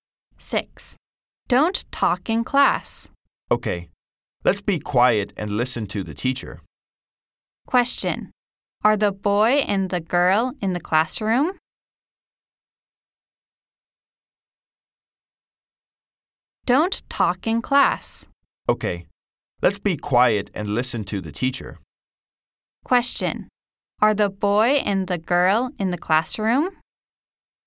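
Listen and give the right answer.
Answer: Yes, they are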